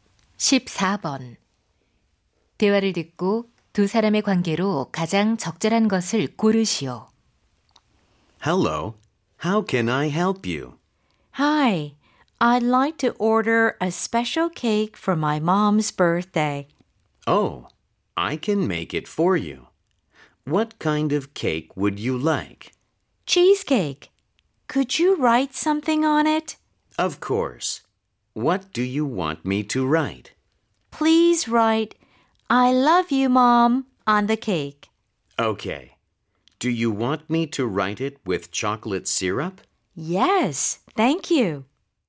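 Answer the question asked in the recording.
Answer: 제빵사와 손님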